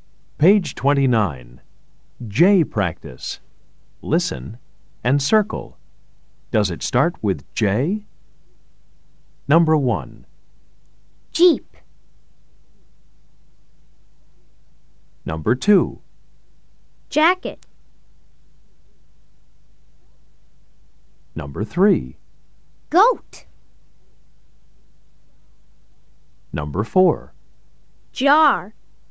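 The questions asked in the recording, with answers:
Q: Jeep.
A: Yes

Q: Jacket.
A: Yes

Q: Goat.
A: No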